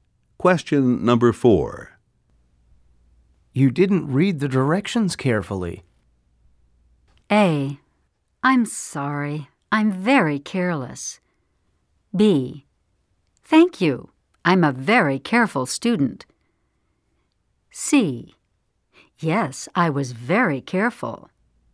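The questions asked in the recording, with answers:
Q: You didn't read the directions carefully.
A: A: I'm sorry, I'm very careless.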